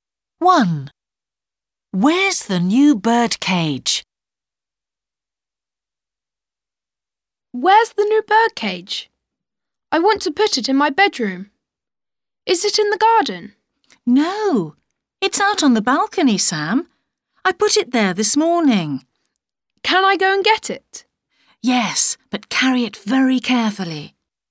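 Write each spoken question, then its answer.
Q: Where's the new birdcage?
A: On the balcony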